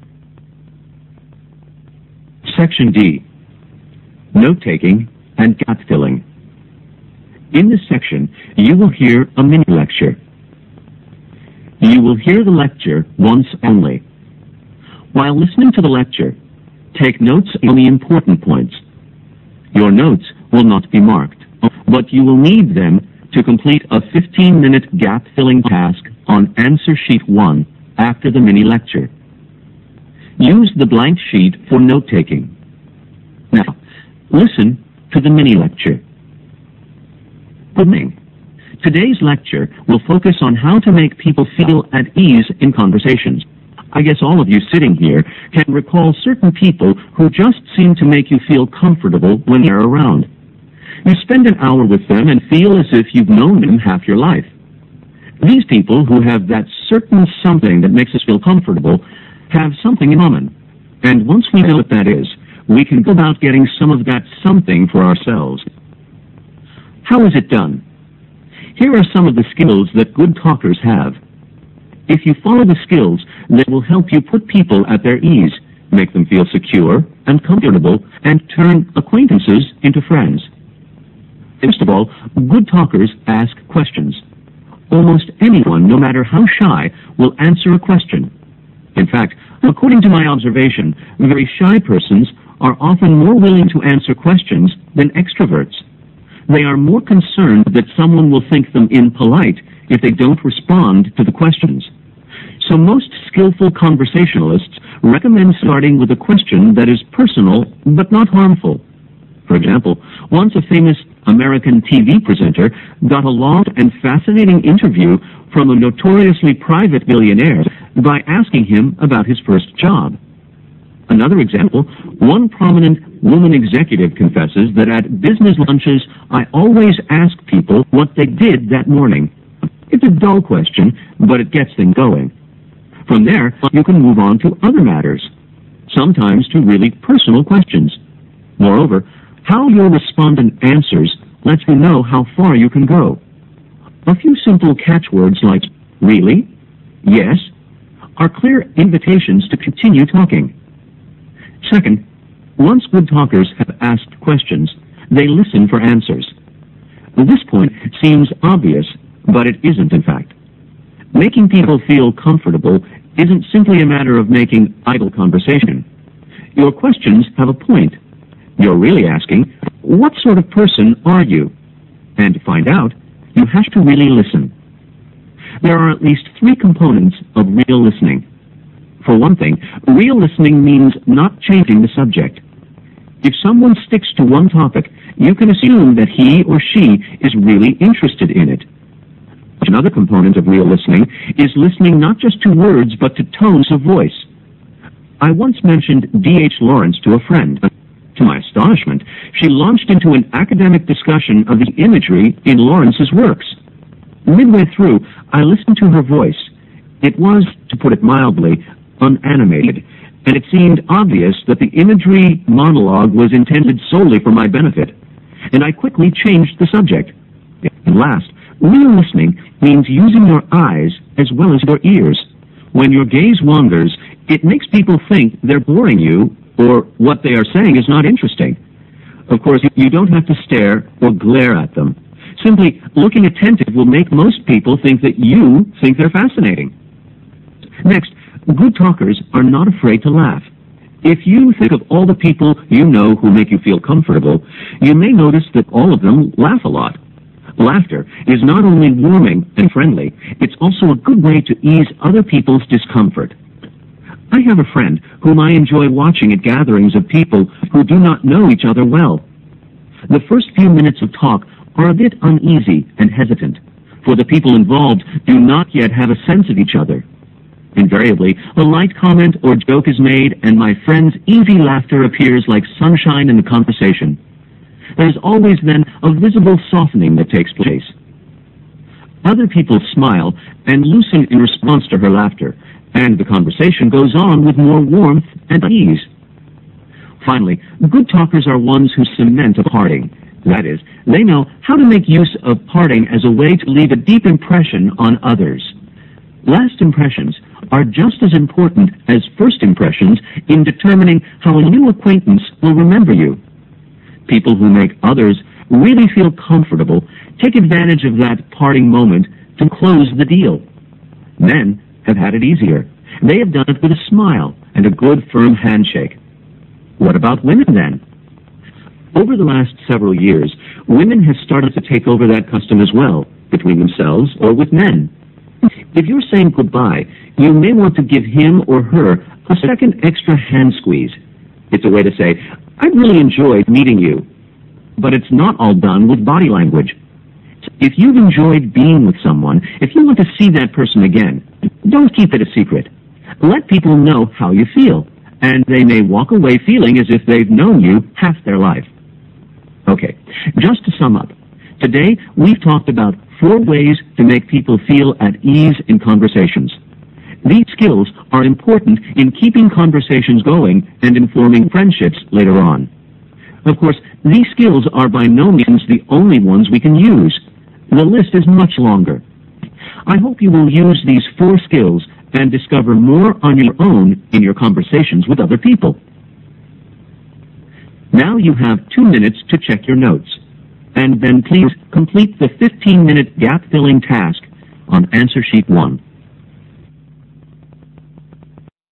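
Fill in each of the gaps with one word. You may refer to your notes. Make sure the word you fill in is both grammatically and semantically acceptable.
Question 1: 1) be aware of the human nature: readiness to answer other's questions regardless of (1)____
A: shyness

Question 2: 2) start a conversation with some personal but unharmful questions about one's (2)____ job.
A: first

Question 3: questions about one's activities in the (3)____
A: morning

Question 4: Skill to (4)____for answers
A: listen

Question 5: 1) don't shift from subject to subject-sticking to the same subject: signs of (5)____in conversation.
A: interest

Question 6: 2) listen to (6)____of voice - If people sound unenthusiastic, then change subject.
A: tones

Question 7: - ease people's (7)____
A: discomfort

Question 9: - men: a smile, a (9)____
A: handshake

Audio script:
Good morning. Today's lecture will focus on how to make people feel at ease in conversations. 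I guess all of you sitting here can recall certain people who just seem to make you feel comfortable when they are around. You spend an hour with them and feel as if you've known them half your life. These people who have that certain something that makes us feel comfortable have something in common, and once we know what that is, we can go about getting some of that something for ourselves. How is it done? Here are some of the skills that good talkers have. If you follow the skills, they will help you put people at their ease, make them feel secure, and comfortable, and turn acquaintances into friends.
First of all, good talkers ask questions. Almost anyone, no matter how shy, will answer a question. In fact, according to my observation, very shy persons are often more willing to answer questions than extroverts. They are more concerned that someone will think them impolite if they don't respond to the questions. 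So most skillful conversationalists recommend starting with a question that is personal, but not harmful. For example, once a famous American TV presenter got a long and fascinating interview from a notoriously private billionaire by asking him about his first job. Another example, one prominent woman executive confesses that at business lunches, "I always ask people what they did that morning. It's a dull question, but it gets things going." From there, you can move on to other matters, sometimes to really personal questions. Moreover, how your responder answers will let you know how far you can go. A few simple catchwords like "Really?" "Yes?" are clear invitations to continue talking.
Second, once good talkers have asked questions, they listen for answers. This point seems obvious, but it isn't in fact. Making people feel comfortable isn't simply a matter of making idle conversation. 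Your questions have a point. You're really asking, "What sort of person are you?" and to find out, you have to really listen. There are at least three components of real listening. For one thing, real listening means not changing the subject. If someone sticks to one topic, you can assume that he or she is really interested in it. Another component of real listening is listening not just to words but to tones of voice. I once mentioned D.H. Lawrence to a friend. To my astonishment, she launched into an academic discussion of the imagery in Lawrence's works. Midway through, I listened to her voice. It was, to put it mildly, unanimated, and it seemed obvious that the imagery monologue was intended solely for my benefit, and I quickly changed the subject. At last, real listening means using your eyes as well as your ears. When your gaze wanders, it makes people think they're boring your, or what they are saying is not interesting. 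Of course, you don't have to stare, or glare at them. Simply looking attentive will make most people think that you think they're fascinating.
Next, good talkers are not afraid to laugh. If you think of all the people you know who make you feel comfortable, you may notice that all of them laugh a lot. Laughter is not only warming and friendly, it's also a good way to ease other people's discomfort. I have a friend who might enjoy watching at gathering of other people who do not know each other well. The first few minutes of talk are a bit uneasy and hesitant, for the people involved do not yet have a sense of each other. Invariably, a light comment or joke is made, and my friend's easy laughter appears like sunshine in the conversation. There is always then a visible softening that takes place. Other people smile, and loosen in response to her laughter, and the conversation goes on with more warmth and ease.
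Finally, good talkers are onces who cement a parting. That is, they know how to make use of parting as a way to leave a deep impression on others. Last impressions are just as important as first impressions in determining how a new acquaintance will remember you. People who make others really feel comfortable take advantage of that parting moment to close the deal. Men have had it easier. They have done it with a smile, and a good firm handshake. What about women then? Over the last several years, women have started to take over that custom well between themselves or with men. If you're saying goodbye, you might want to give him or her a second extra hand squeeze. It's a way to say, I really enjoyed meeting you. But it's not all done with body language. If you've enjoyed being with someone, if you want to see that person again, don't keep it a secret. Let people know how you feel, and they may walk away feeling as if they've known you half their life.
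Okay, just to sum up. These skills are important in keeping conversations going, and in forming friendships later on. Of course, these skills are by no means the only ones we can use. the list is much longer. I hope you will use these four skills, and discover more on your own in your conversations with other people.
Now you have two minutes to check your notes, and then please complete the 15 minute gap filling task on Answer Sheet One.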